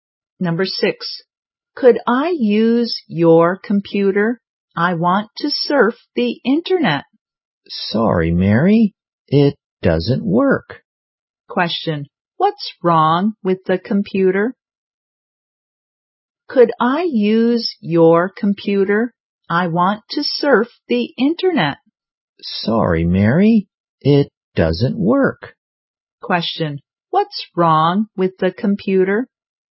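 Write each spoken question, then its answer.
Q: What's wrong with the computer?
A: It doesn't work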